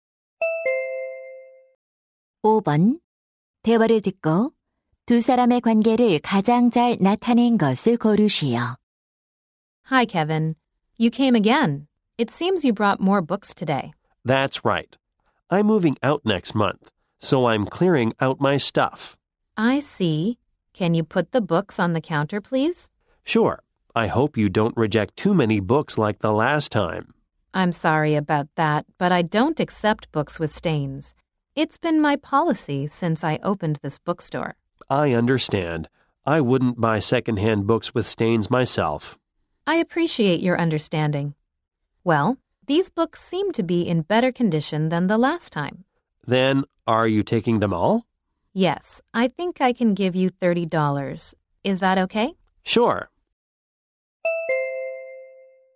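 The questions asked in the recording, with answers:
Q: 대화를 듣고 두 사람의 관계를 가장 잘 나타낸 것을 고르시오.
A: 중고 서점 주인 - 책을 파는 손님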